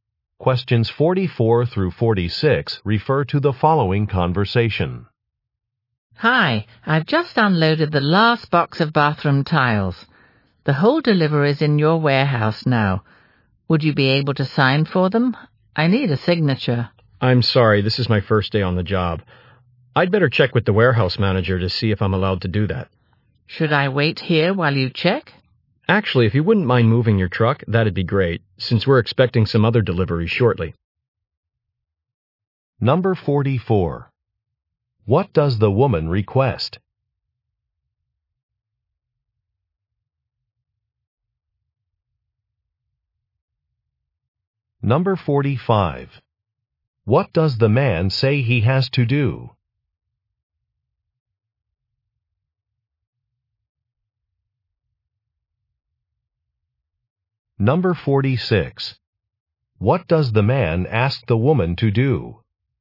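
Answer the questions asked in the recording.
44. A signature for a delivery
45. Check with the warehouse manager
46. Move her truck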